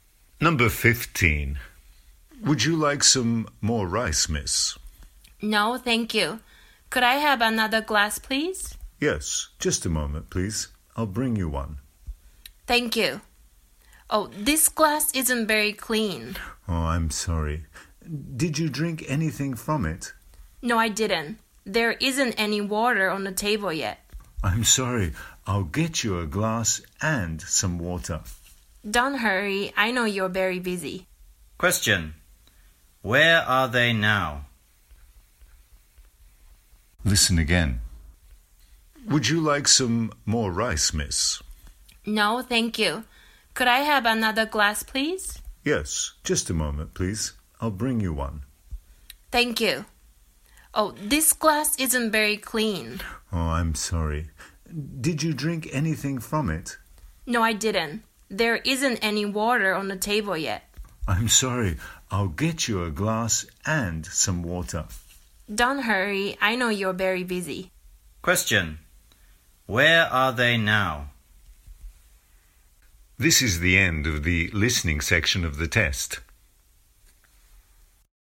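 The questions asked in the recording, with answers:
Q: Where are they now?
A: At a restaurant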